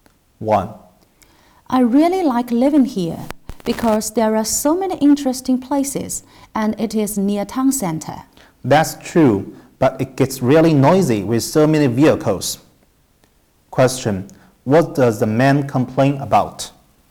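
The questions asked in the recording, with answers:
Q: What does the man complain about?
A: The noise from heavy traffic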